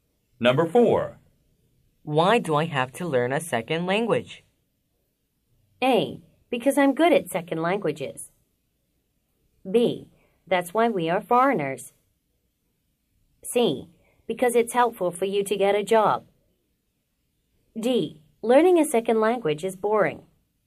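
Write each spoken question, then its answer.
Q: Why do I have to learn a second language?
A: C: Because it's helpful for you to get a job.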